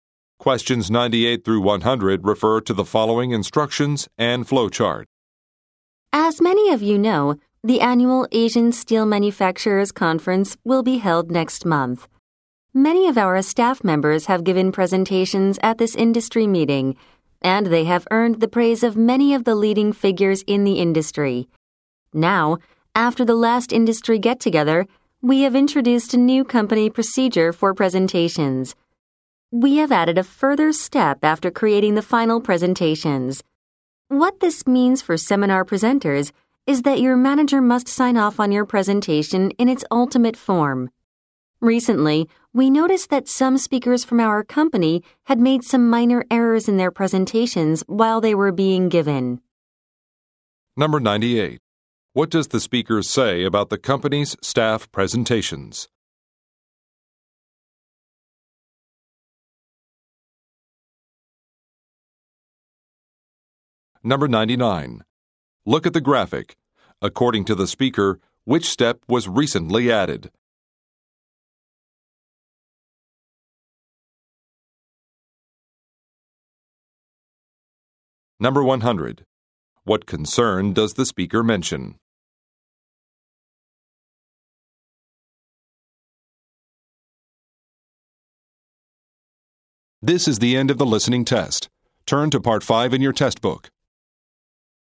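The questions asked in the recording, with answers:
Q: What does the speaker say about the company's staff presentations?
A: They have been praised by leading figures in the industry

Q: What concern does the speaker mention?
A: Some speakers made minor errors during their presentations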